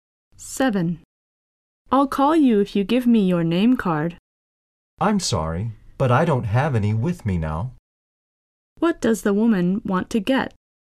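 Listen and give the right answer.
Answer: The man's name card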